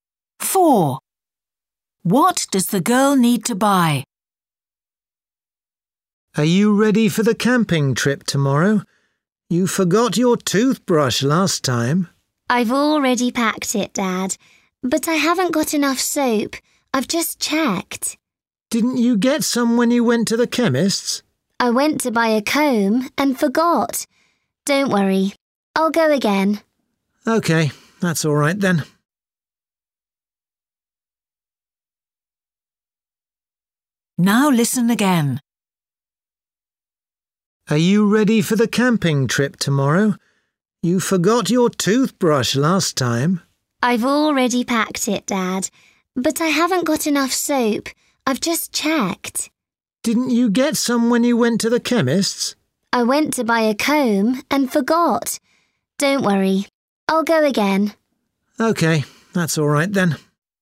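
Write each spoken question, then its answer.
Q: What does the girl need to buy?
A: Soap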